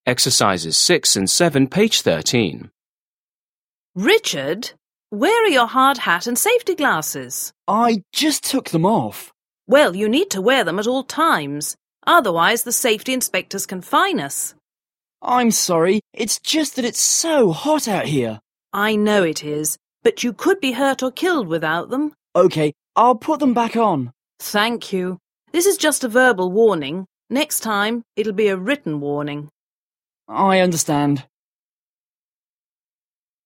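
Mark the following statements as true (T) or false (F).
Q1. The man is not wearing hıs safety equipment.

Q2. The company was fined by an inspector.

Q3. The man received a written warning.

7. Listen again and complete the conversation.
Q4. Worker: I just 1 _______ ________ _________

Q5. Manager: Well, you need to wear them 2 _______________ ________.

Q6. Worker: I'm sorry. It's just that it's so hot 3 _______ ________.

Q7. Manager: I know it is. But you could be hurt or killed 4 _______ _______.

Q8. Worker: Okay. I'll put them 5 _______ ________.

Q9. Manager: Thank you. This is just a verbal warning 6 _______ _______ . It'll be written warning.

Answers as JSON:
{"1": "T", "2": "F", "3": "F", "4": "took them off", "5": "at all times", "6": "out here", "7": "without them", "8": "back on", "9": "Next time"}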